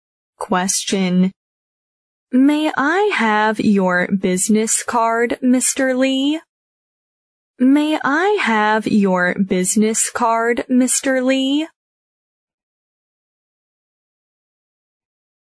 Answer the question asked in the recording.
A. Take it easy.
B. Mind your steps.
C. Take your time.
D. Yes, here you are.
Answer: D. Yes, here you are.

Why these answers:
句子意为"李先生,可以给我你的名片吗?",D项Yes,here you are(好的,给你)符合题意。"May/Can/Co

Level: B级